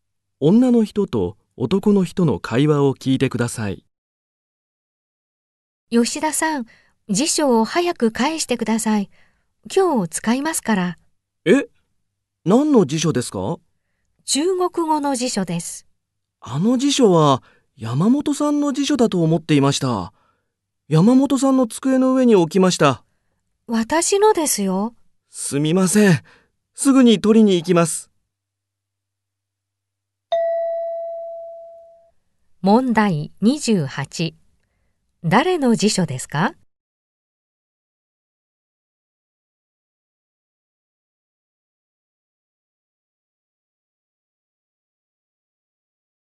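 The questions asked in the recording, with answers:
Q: 誰の辞書ですか?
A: 女の人の辞書

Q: 男の人はこのあとまず何をしますか?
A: 山本さんの机に辞書を取りに行く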